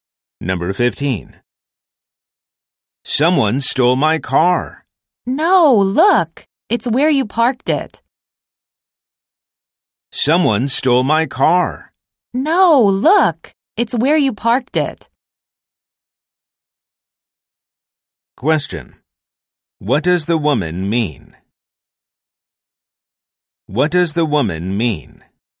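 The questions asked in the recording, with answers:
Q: What does the woman mean?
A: The car was not stolen; it is where he parked it.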